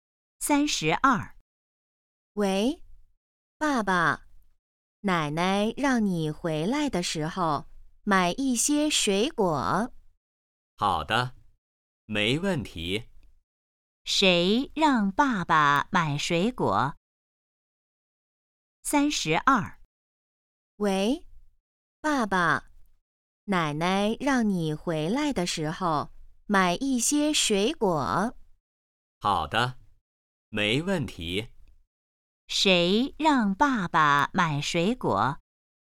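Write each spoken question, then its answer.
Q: 谁让爸爸买水果?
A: 奶奶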